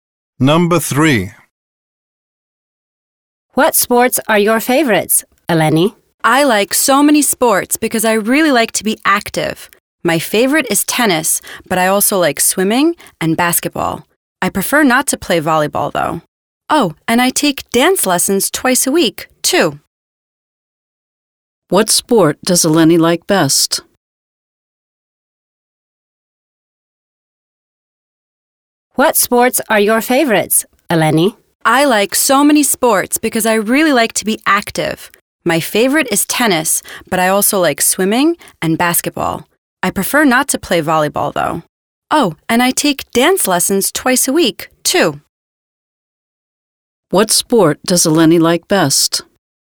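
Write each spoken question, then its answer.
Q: What sport does Eleni like best?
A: Tennis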